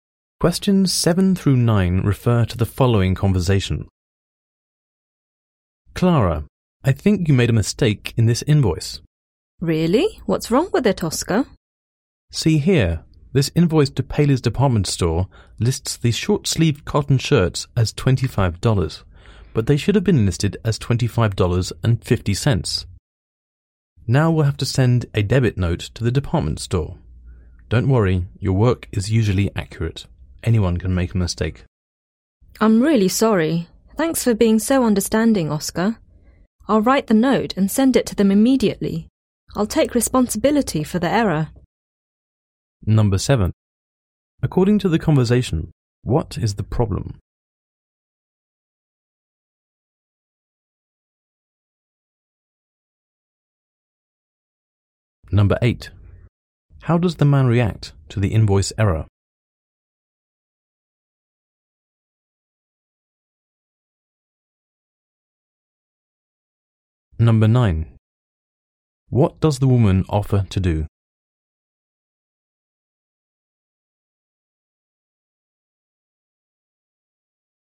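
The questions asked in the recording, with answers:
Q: According to the conversation, what is the problem?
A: An invoice listed the shirts at the wrong price ($25 instead of $25.50)

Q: How does the man react to the invoice error?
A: He is understanding and tells her not to worry

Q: What does the woman offer to do?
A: Write the debit note and send it immediately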